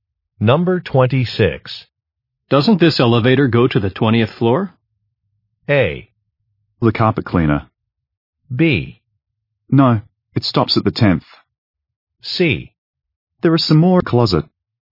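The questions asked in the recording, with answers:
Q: Doesn't this elevator go to the 20th floor?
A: B: No, it stops at the 10th.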